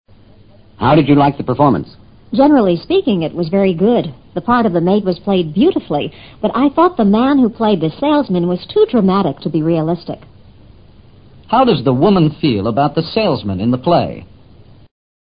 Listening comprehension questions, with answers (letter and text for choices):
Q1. How does the woman feel about the salesman in the play?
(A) The woman thinks the salesman was realistic.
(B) The woman thinks the salesman exaggerated his part.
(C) The woman thinks the salesman was not dramatic enough.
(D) The woman thinks the salesman played his part well.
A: (B) The woman thinks the salesman exaggerated his part.

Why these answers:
too dramatic to be realistic: 过分做作有失真实。此义与exaggerated (夸张)his part的含义基本相同。